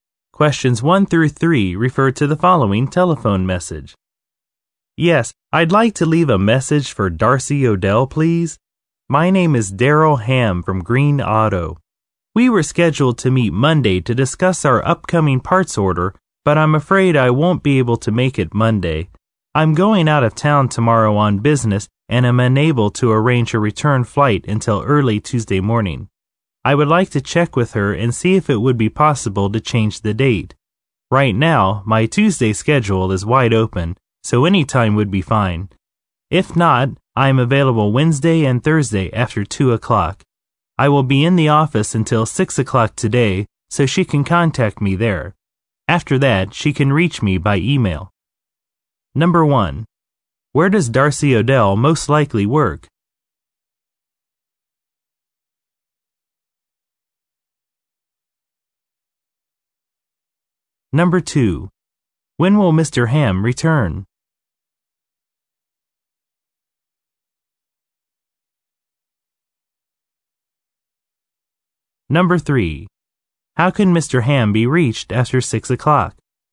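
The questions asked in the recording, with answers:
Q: When will Mr. Hamm return?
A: Early Tuesday morning

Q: How can Mr. Hamm be reached after 6 o'clock?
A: By email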